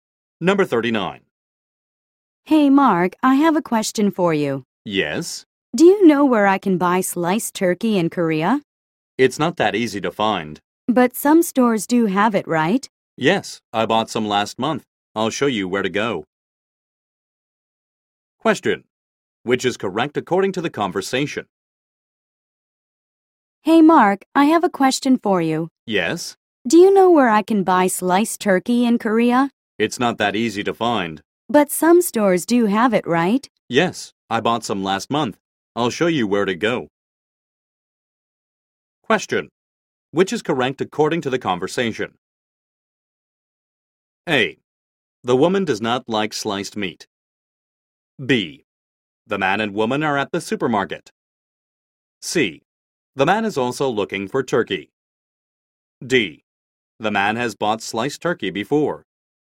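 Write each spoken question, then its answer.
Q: Which is correct according to the conversation?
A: D: The man has bought sliced turkey before.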